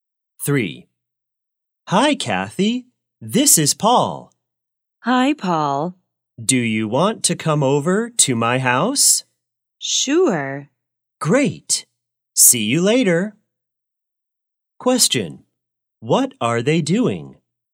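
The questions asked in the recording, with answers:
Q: What are they doing?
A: Talking on the phone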